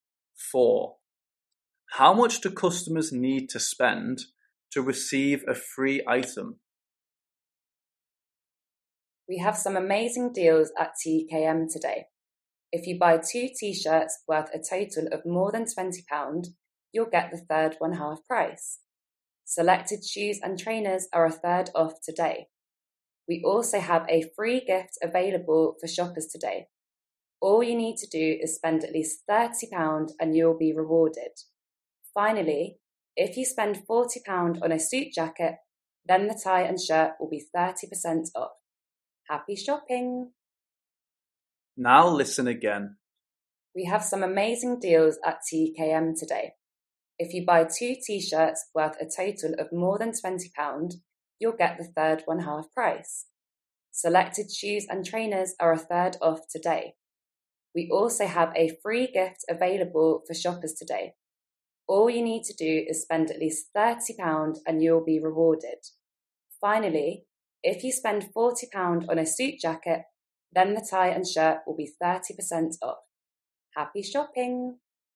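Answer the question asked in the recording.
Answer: £30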